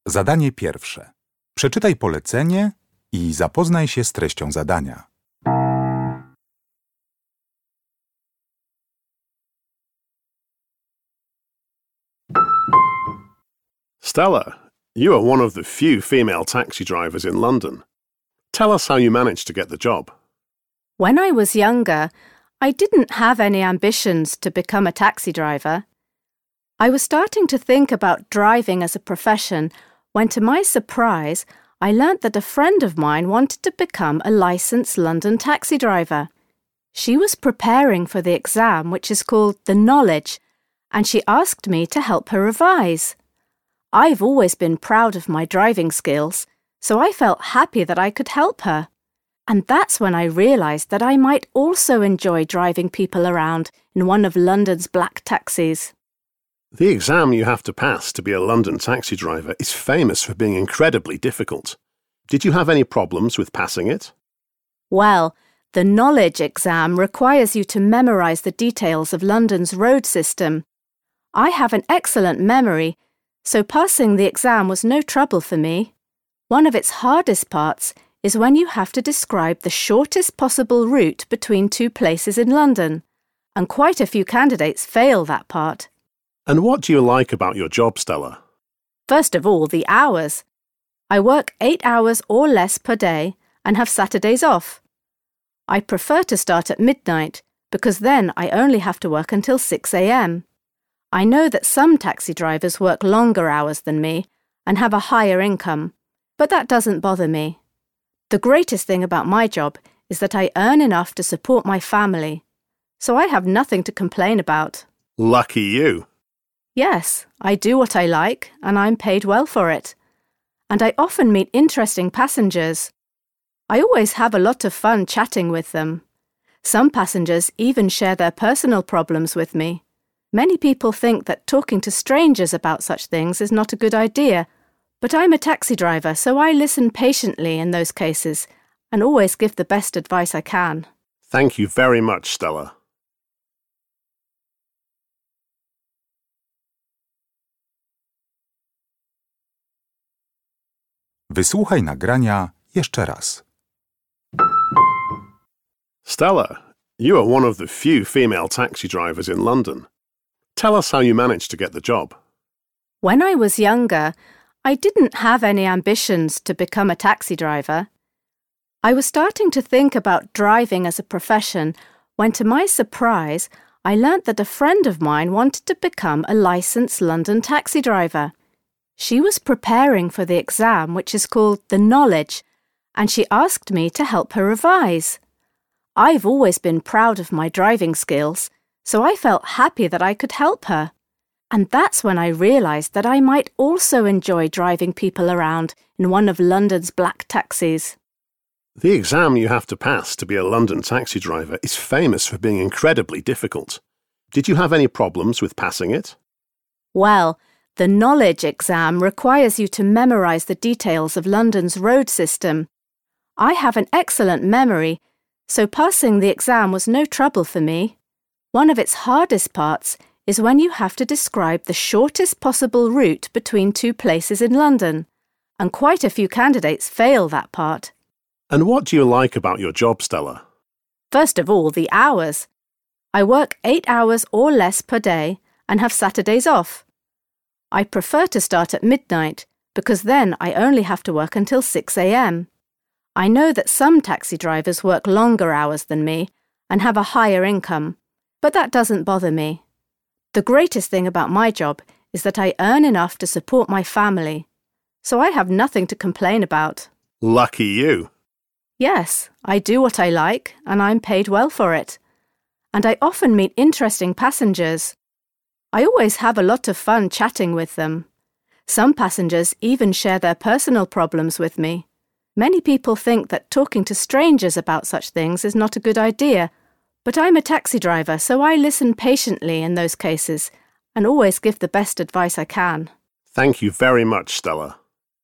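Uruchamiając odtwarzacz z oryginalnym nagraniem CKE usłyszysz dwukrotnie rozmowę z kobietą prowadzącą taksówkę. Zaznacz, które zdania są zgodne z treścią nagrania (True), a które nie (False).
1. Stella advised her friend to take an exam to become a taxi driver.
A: False

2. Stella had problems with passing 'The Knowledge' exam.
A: False

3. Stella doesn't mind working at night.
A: True

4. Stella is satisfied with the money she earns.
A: True

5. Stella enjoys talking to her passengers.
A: True

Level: poziom podstawowy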